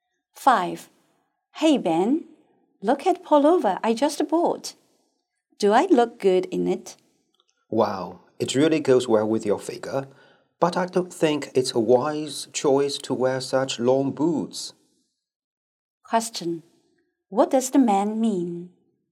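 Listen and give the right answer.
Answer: The pullover suits her but the long boots don't go with it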